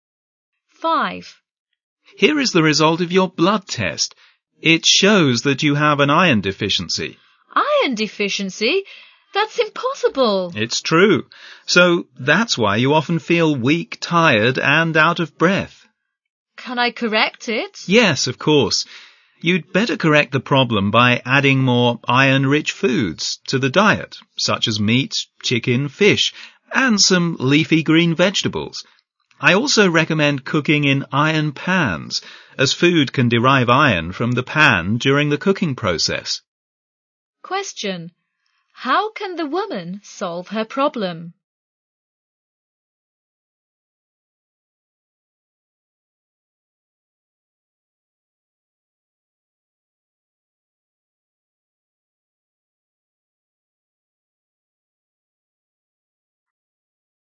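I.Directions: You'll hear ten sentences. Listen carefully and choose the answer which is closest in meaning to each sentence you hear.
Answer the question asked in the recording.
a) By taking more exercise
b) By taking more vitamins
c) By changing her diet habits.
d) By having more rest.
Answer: c) By changing her diet habits.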